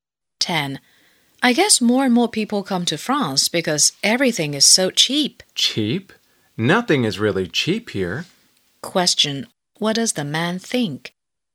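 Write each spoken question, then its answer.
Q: What does the man think?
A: Things in France are not cheap.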